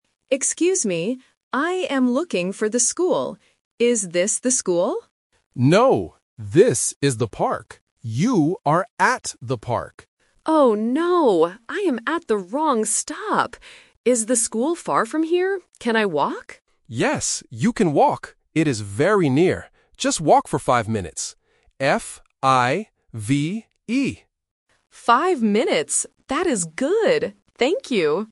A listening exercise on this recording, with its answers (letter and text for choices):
Listen to the conversation between a passenger and a passerby. Read the questions and choose the correct answer (A, B, or C).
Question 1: Where is the passenger now?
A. At the school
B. At the park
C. At the bus station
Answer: B. At the park

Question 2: Is the school far from the park?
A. Yes, it is very far.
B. No, it is very near.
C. No, it is closed.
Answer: B. No, it is very near.

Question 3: How many minutes does it take to walk to the school?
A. Five minutes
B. Fifteen minutes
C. Fifty minutes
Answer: A. Five minutes

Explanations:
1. The passerby explicitly tells the passenger, "No, this is the park. You are at the park." Why the traps are wrong: Option A is a trap because the passenger asks, "Is this the school?", but the passerby says "No." Option C is a plausible place related to buses, but it is not mentioned in the audio.
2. When the passenger asks if the school is far, the passerby replies, "It is very near." Why the traps are wrong: Option A is a trap because the word "far" is asked in the question ("Is the school far from here?"), but it is not the reality. Option C is a plausible answer about a school, but it is never mentioned.
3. The passerby states the time and spells the number out clearly: "Just walk for five minutes. F-I-V-E." Why the traps are wrong: Options B and C are phonetic traps. "Fifteen" and "Fifty" sound similar to "Five" or start with the same sound, testing if the student can follow the exact spelling provided.